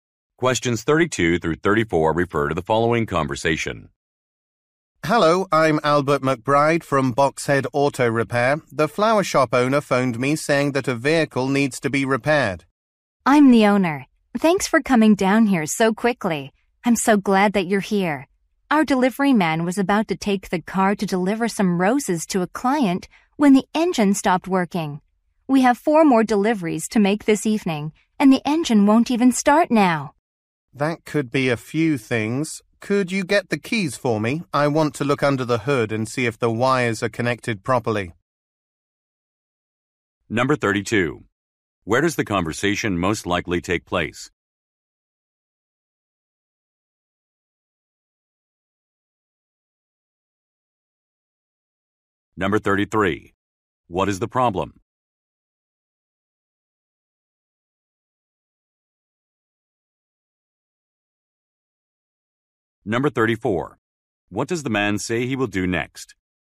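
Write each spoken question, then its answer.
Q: Where does the conversation most likely take place?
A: At a flower shop

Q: What is the problem?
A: A delivery car's engine won't start

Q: What does the man say he will do next?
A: Look under the hood to check the wires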